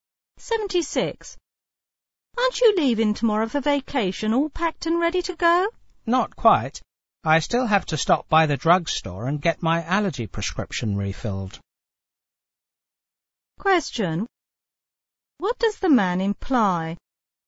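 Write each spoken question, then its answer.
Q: What does the man imply?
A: He isn't fully ready yet; he still needs to get his allergy prescription refilled at the drugstore.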